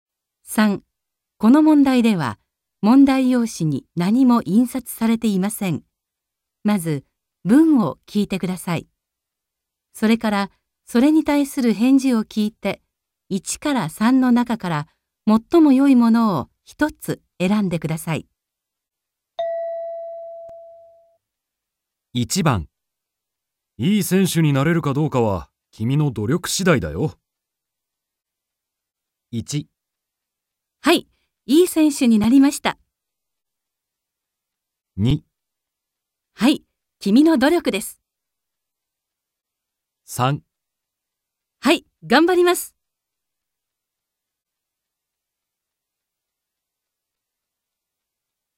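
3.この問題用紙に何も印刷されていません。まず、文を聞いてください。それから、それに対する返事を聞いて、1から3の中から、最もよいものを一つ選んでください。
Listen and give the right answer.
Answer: はい、がんばります。

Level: N2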